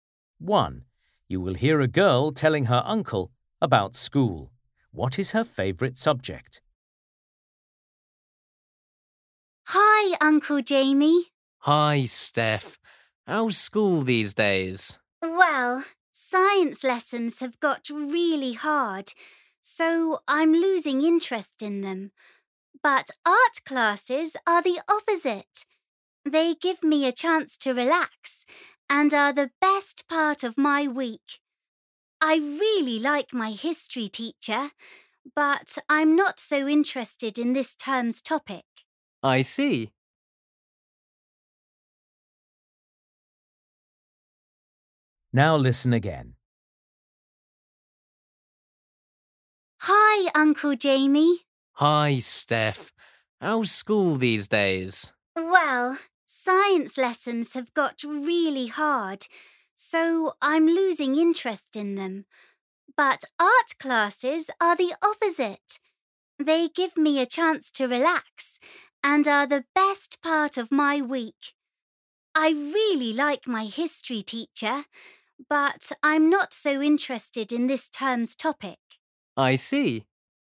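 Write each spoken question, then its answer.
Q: What is her favourite subject?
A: art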